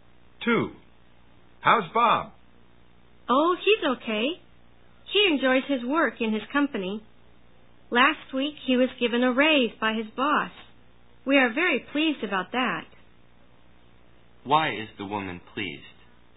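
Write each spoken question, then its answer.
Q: Why is the woman pleased?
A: Bob got a raise from his boss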